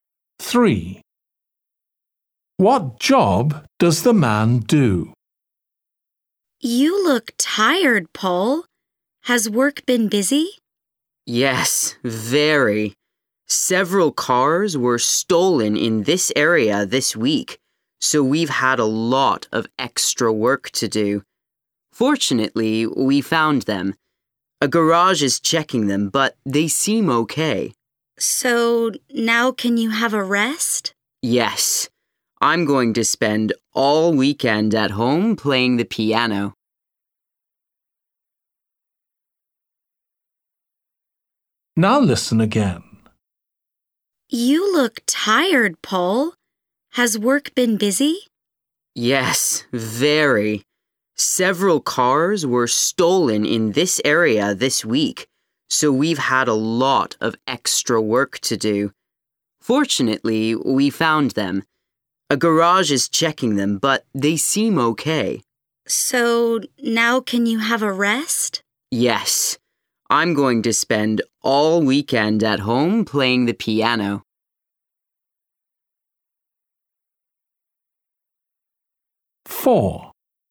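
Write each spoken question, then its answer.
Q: What job does the man do?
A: Police officer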